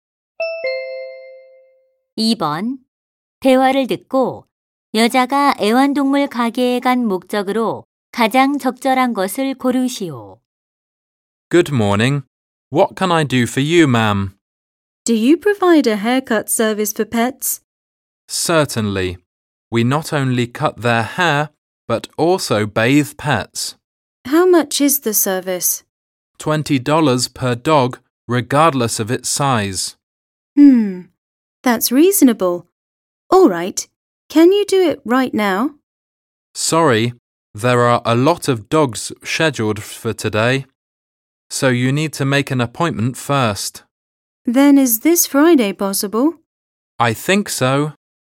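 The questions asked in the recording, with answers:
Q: 대화를 듣고 여자가 애완동물 가게에 간 목적으로 가장 적절한 것을 고르시오.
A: 개 미용 예약을 하려고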